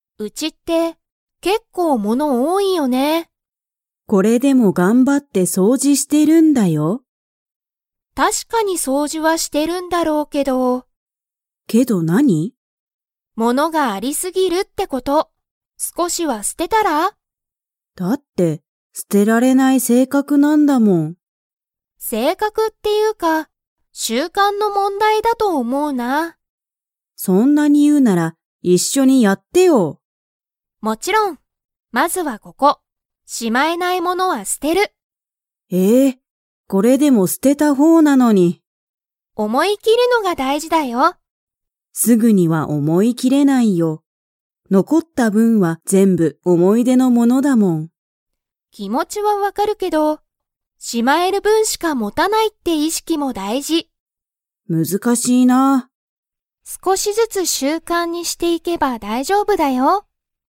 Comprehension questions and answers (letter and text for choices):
Comprehension Quiz (Skip if you don't understand the conversation yet)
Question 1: お母かあさんは、 性格せいかくだ。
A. 毎日まいにち掃除そうじする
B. 物ものをしまう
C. 捨すてられない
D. 思おもい切きる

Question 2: レナは、お母かあさんと一緒いっしょに掃除そうじを 。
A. する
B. しない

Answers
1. C. 捨すてられない
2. A. する

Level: Level 4